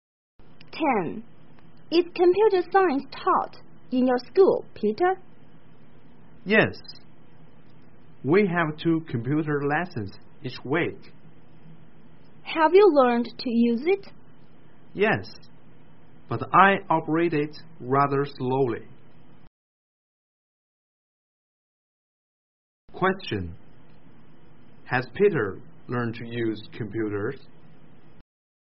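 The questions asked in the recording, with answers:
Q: Has Peter learned to use computers?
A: Yes, but he operates it rather slowly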